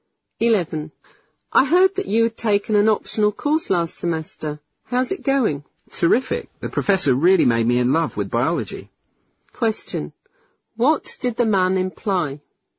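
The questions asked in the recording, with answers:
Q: What did the man imply?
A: He really enjoys the course (biology)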